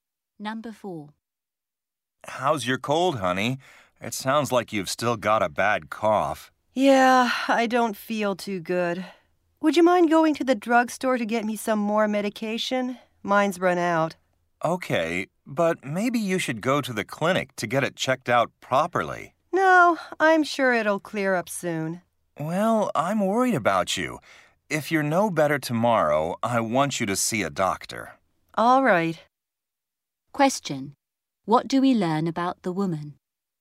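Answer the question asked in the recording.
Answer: She still has a bad cough and her cold medication has run out.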